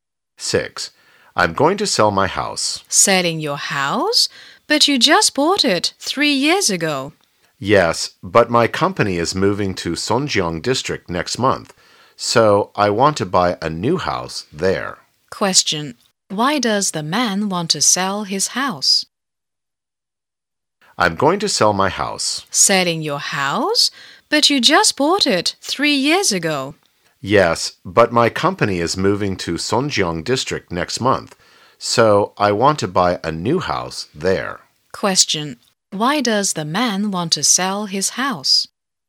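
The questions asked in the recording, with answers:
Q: Question. Why does the man want to sell his house?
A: His company is moving to Songjiang District, so he wants to buy a new house there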